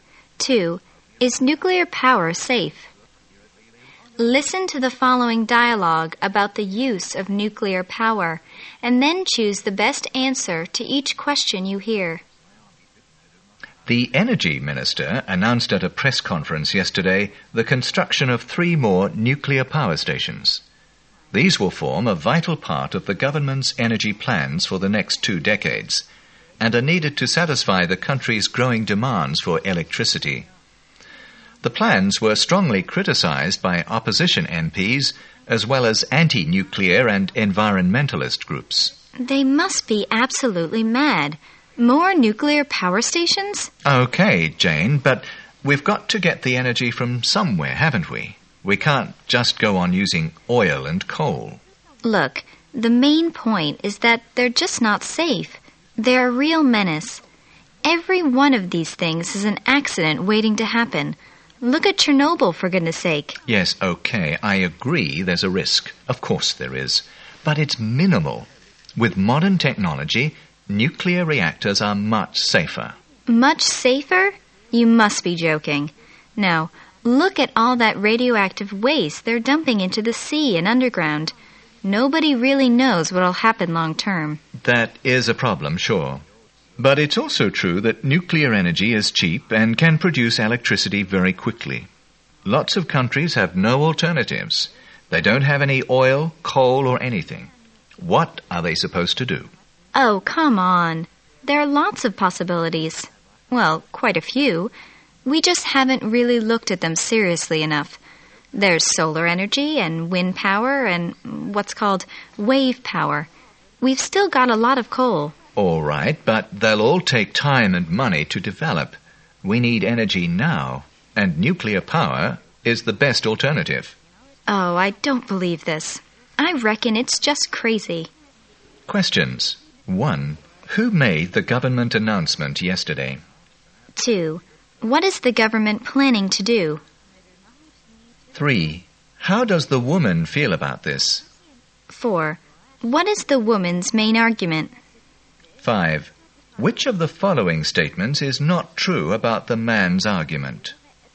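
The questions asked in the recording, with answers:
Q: Who made the government announcement yesterday?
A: The energy minister.

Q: What is the government planning to do?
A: Build 3 more nuclear power stations.

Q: How does the woman feel about this?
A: She is strongly against it and thinks it is crazy.

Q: What is the woman's main argument?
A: Nuclear power stations are not safe.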